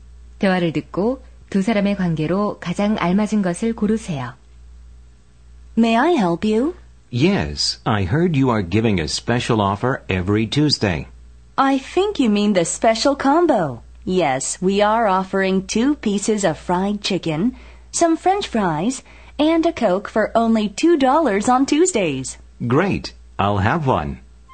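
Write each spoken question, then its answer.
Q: 대화를 듣고 두 사람의 관계로 가장 알맞은 것을 고르세요.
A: 점원과 손님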